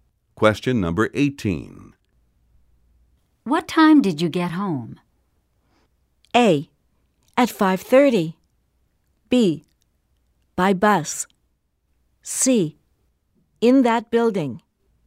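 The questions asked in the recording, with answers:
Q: What time did you get home?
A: A: At 5:30.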